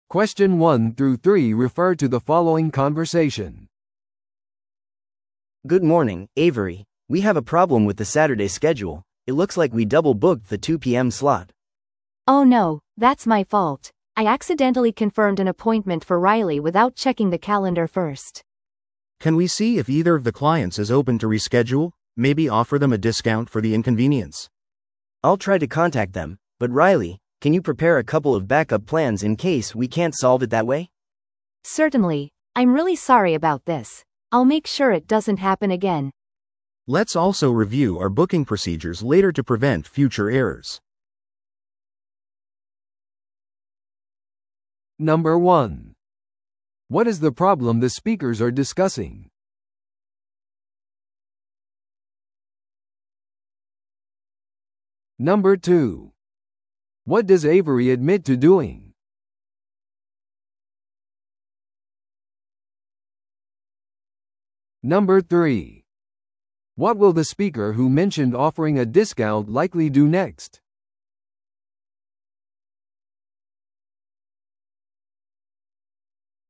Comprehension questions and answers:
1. What is the problem the speakers are discussing?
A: 予約枠がオーバーブックされている。

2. What does Avery admit to doing?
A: 偶然、同じ時間に2人のクライアントをスケジューリングしてしまった。

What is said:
A: Good morning, Avery. We have a problem with the Saturday schedule. It looks like we double-booked the 2 PM slot.
B: Oh no, that's my fault. I accidentally confirmed an appointment for Riley without checking the calendar first.
C: Can we see if either of the clients is open to reschedule? Maybe offer them a discount for the inconvenience.
A: I'll try to contact them. But Riley, can you prepare a couple of backup plans in case we can't solve it that way?
B: Certainly. I'm really sorry about this. I'll make sure it doesn't happen again.
C: Let's also review our booking procedures later to prevent future errors.